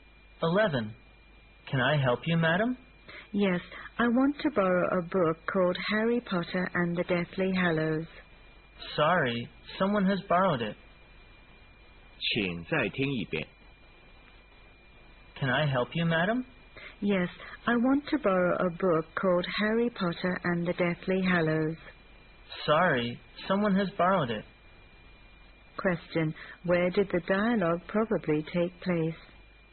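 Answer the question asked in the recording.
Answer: In a library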